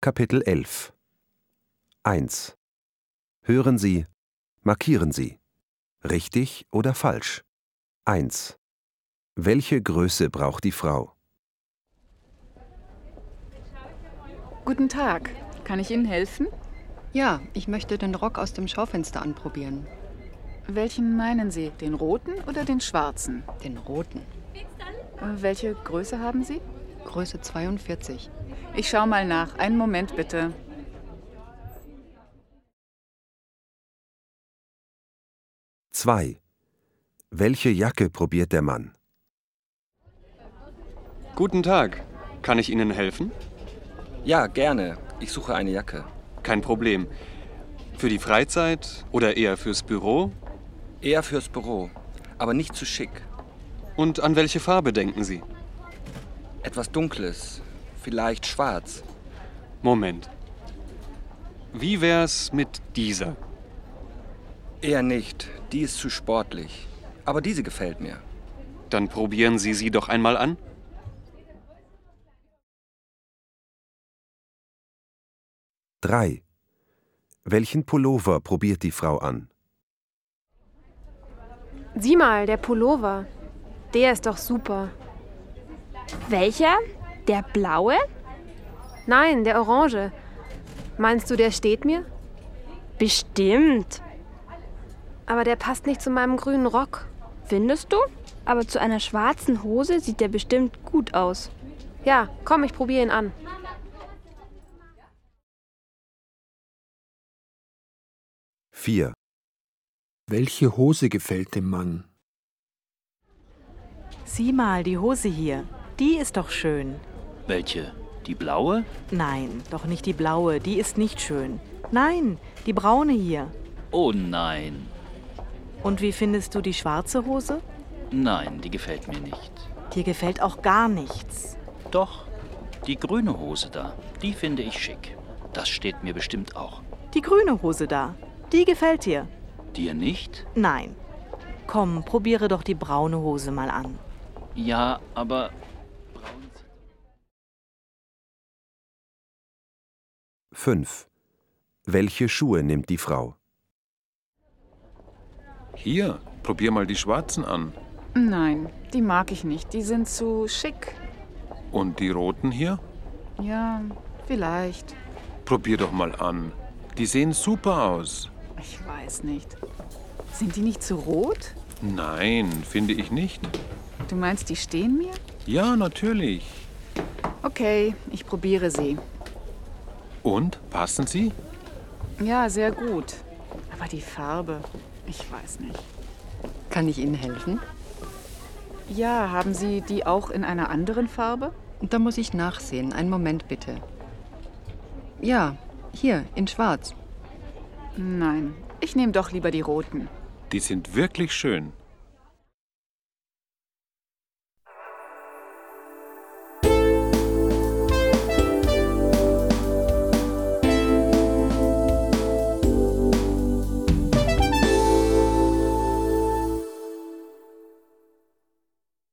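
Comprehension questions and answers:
Hören Sie die Dialoge. Markieren Sie: richtig oder falsch.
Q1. Die Frau möchte den roten Rock probieren.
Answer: richtig

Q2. Der Mann probiert eine dunkle, sportliche Jacke.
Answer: falsch

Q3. Die Frau probiert den blauen Pullover.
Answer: falsch

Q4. Dem Mann gefällt die schwarze Hose.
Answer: falsch

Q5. Die Frau kauft die roten Schuhe.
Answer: richtig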